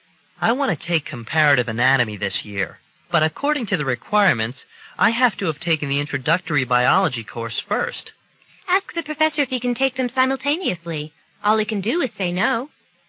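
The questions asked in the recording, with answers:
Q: What does the woman suggest the man do?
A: Ask the professor if he can take both courses at the same time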